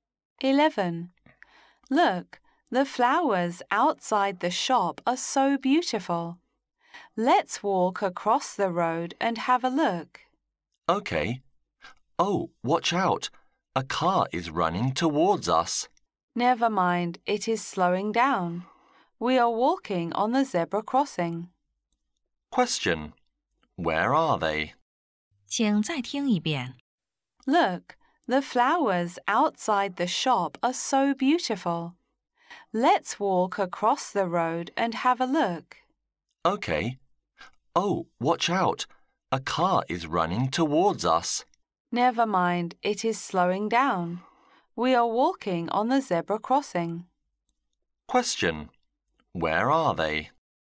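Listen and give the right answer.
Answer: On the zebra crossing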